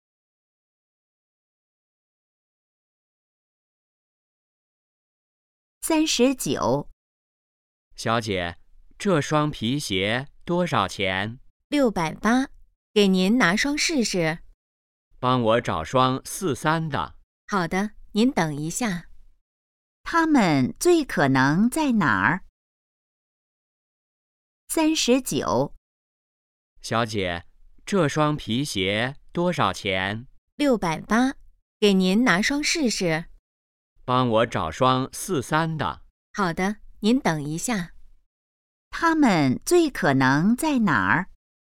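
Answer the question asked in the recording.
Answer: 鞋店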